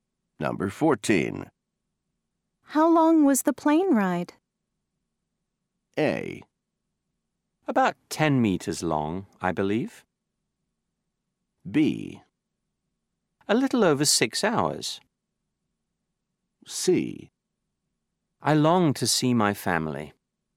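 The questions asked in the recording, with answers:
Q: How long was the plane ride?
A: B: A little over 6 hours.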